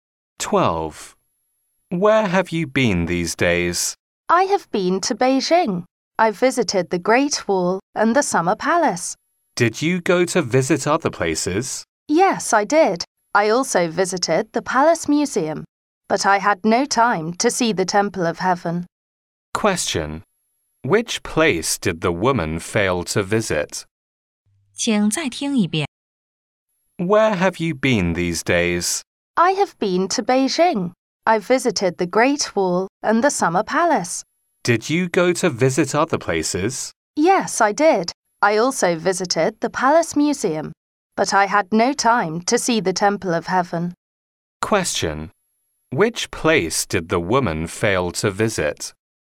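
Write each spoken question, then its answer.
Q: Which place did the woman fail to visit?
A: The Temple of Heaven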